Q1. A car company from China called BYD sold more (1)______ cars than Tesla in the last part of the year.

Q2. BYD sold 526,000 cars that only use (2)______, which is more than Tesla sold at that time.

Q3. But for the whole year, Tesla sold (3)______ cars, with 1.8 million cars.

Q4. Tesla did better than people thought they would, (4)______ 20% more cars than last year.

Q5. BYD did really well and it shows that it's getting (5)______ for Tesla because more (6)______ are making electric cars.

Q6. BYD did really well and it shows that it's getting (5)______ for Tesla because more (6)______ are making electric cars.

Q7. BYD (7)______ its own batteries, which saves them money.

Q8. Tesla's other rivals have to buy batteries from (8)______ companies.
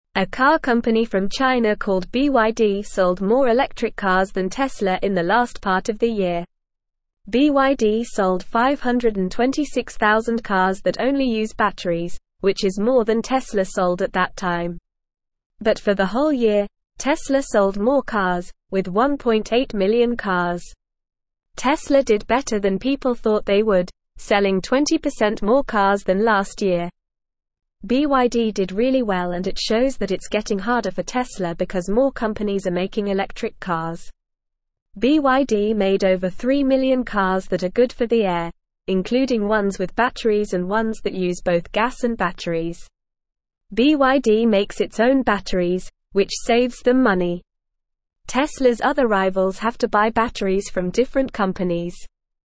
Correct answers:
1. electric
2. batteries
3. more
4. selling
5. harder
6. companies
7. makes
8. different

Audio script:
A car company from China called BYD sold more electric cars than Tesla in the last part of the year. BYD sold 526,000 cars that only use batteries, which is more than Tesla sold at that time. But for the whole year, Tesla sold more cars, with 1.8 million cars. Tesla did better than people thought they would, selling 20% more cars than last year.
BYD did really well and it shows that it's getting harder for Tesla because more companies are making electric cars. BYD made over 3 million cars that are good for the air, including ones with batteries and ones that use both gas and batteries. BYD makes its own batteries, which saves them money. Tesla's other rivals have to buy batteries from different companies.

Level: Level 1